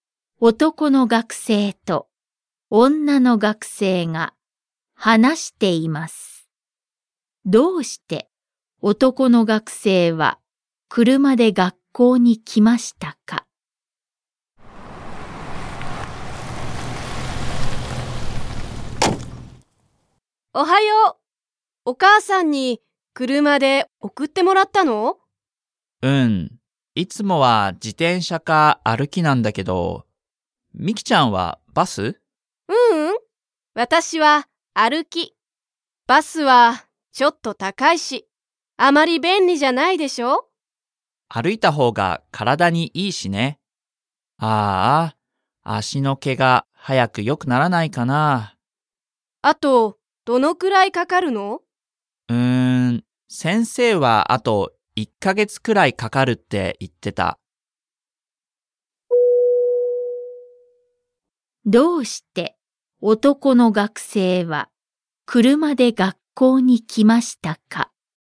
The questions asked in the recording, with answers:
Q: どうして男の学生は車で学校に来ましたか?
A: 足を怪我しているから。